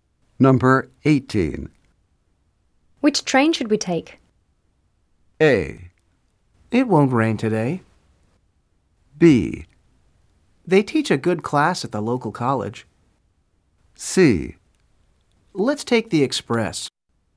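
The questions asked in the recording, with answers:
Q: Which train should we take?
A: C: Let's take the express.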